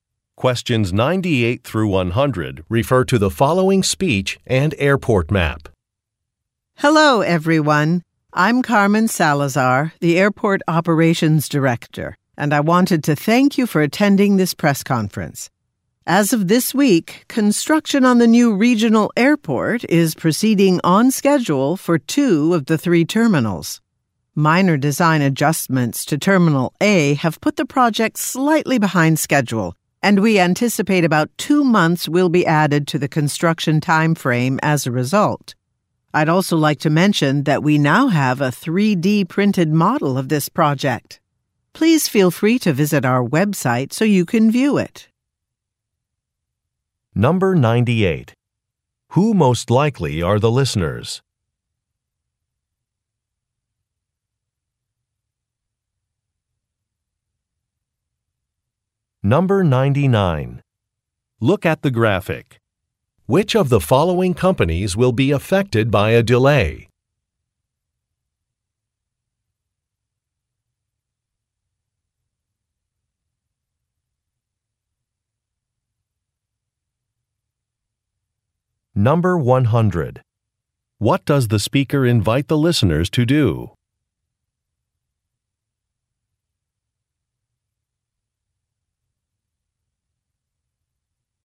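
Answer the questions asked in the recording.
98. Reporters at a press conference
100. Visit the website to view a 3D printed model of the project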